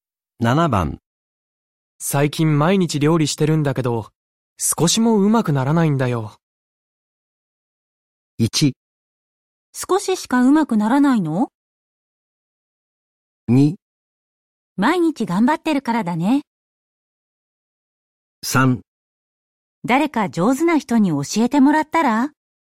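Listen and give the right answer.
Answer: 3: 誰か上手な人に教えてもらったら?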